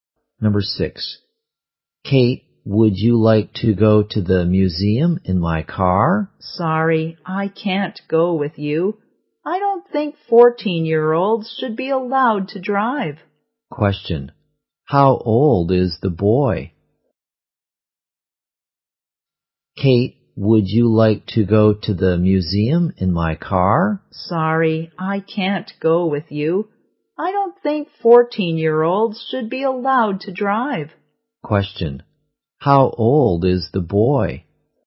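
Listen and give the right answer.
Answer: 14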